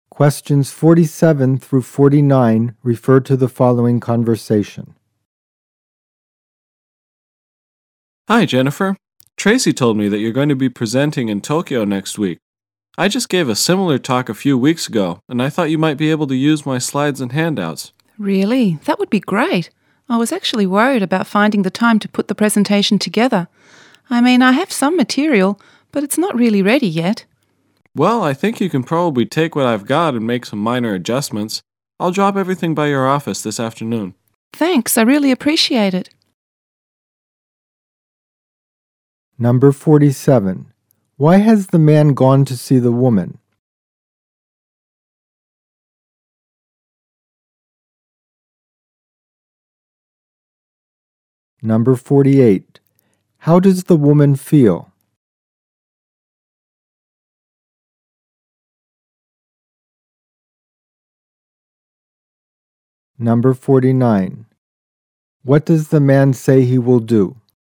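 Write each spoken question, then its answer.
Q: Why has the man gone to see the woman?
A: To offer her his slides and handouts for her presentation

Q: What does the man say he will do?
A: Drop the materials by her office this afternoon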